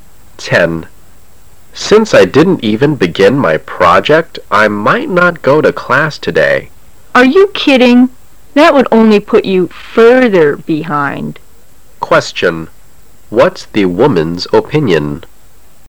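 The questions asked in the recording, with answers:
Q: What's the woman's opinion?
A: Skipping class would only put him further behind.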